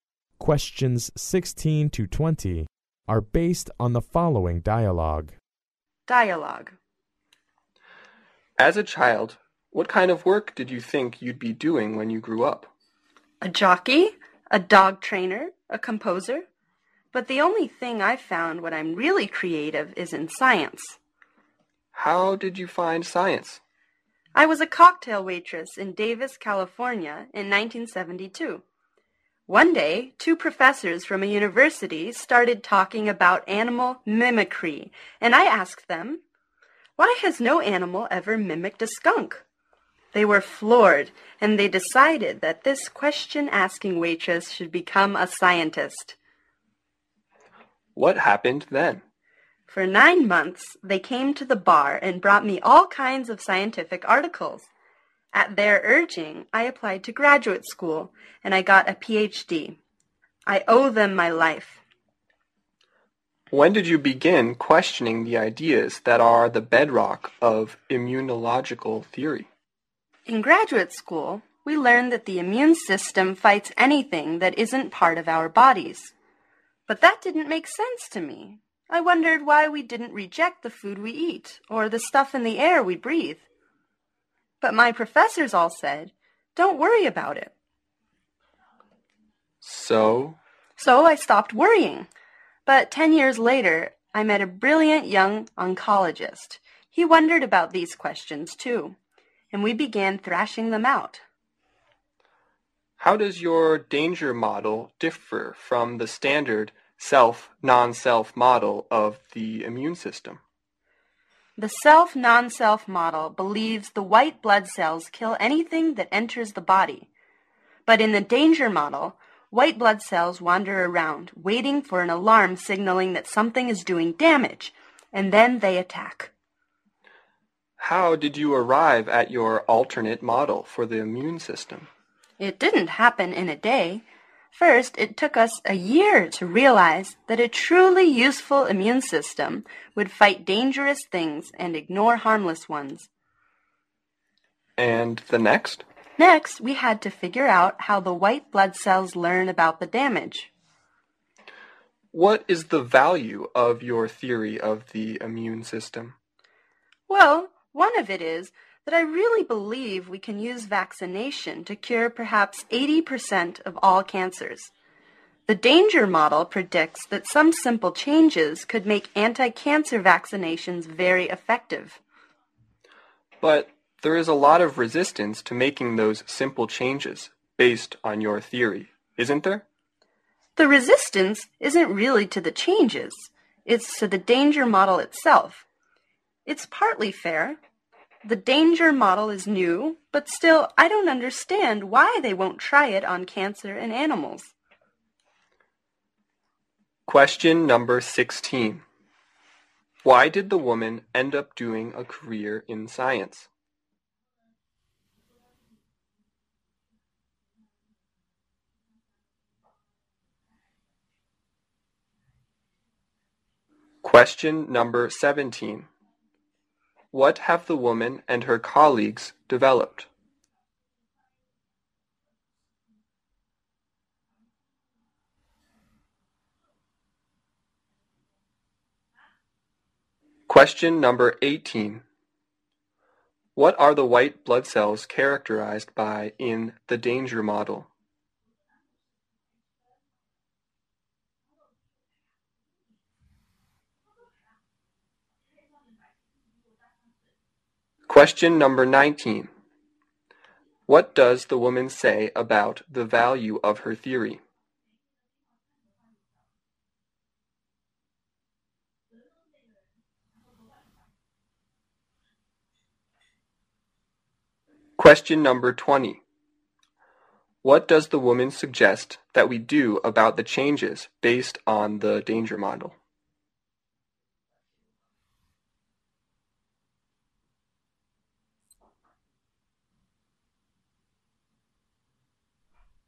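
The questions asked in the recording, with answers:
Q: Why did the woman end up doing a career in science?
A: Two professors encouraged her after she asked a good question as a waitress

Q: What have the woman and her colleagues developed?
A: The danger model of the immune system

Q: What are the white blood cells characterized by in the danger model?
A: They wander around and attack only after an alarm signals damage

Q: What does the woman say about the value of her theory?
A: Vaccination could perhaps cure 80% of all cancers

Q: What does the woman suggest that we do about the changes based on the danger model?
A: Try them on cancer in animals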